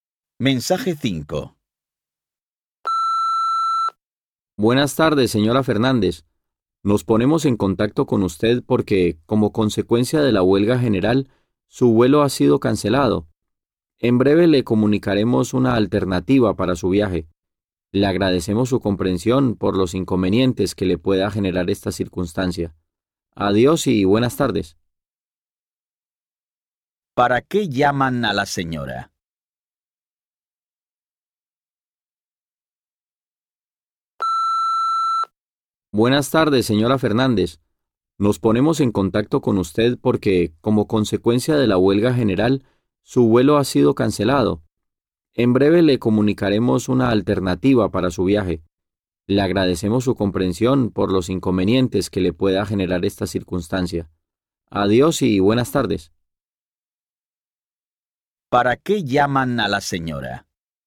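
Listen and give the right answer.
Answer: Para avisarle de que su vuelo ha sido cancelado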